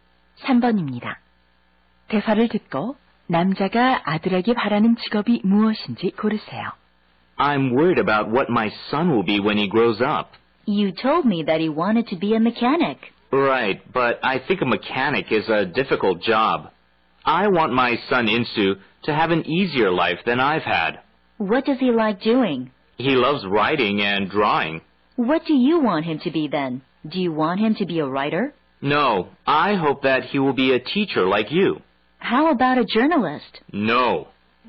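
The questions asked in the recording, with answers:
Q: 대화를 듣고 남자가 아들에게 바라는 직업이 무엇인지 고르세요.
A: 교사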